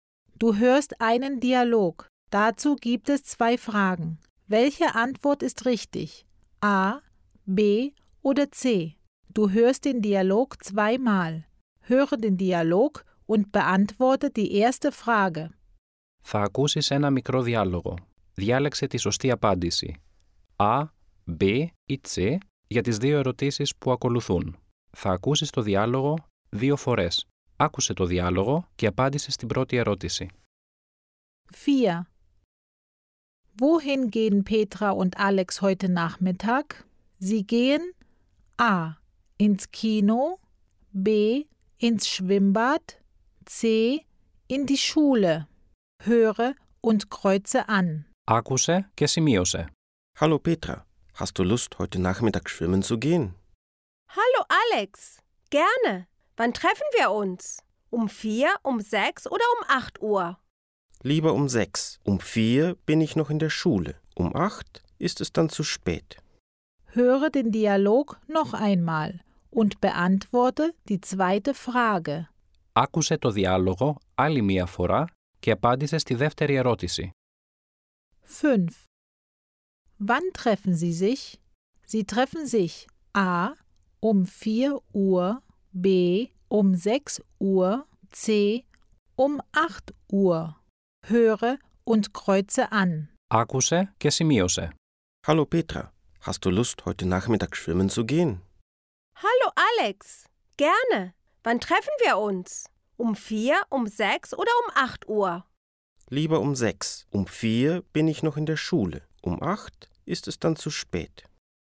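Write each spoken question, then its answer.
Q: Wohin gehen Petra und Alex heute Nachmittag?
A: B: ins Schwimmbad

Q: Wann treffen Sie sich?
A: B: 6 Uhr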